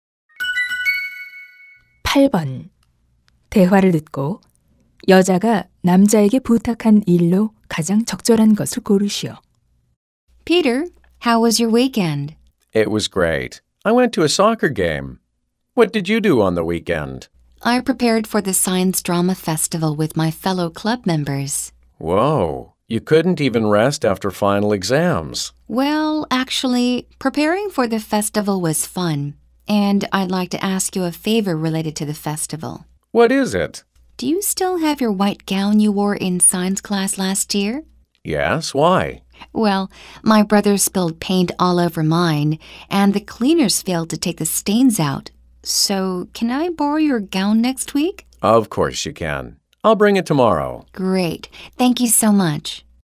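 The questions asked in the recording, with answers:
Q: 대화를 듣고 여자가 남자에게 부탁한 일로 가장 적절한 것을 고르시오.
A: 흰 가운 빌려주기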